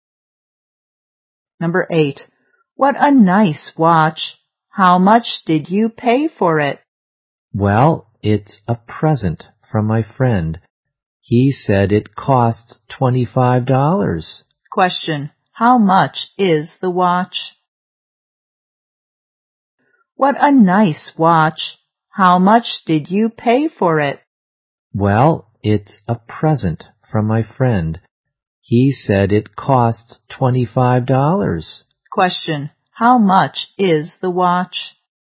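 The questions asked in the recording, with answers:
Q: Question, how much is the watch?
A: $25.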